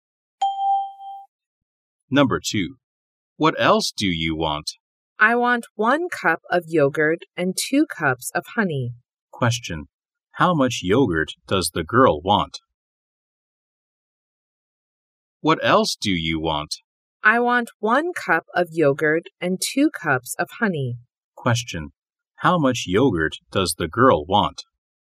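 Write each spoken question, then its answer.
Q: How much yogurt does the girl want?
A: One cup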